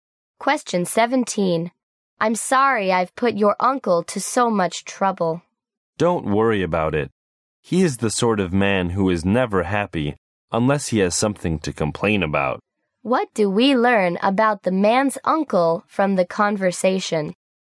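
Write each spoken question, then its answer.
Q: What do we learn about the man's uncle from the conversation?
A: He is always complaining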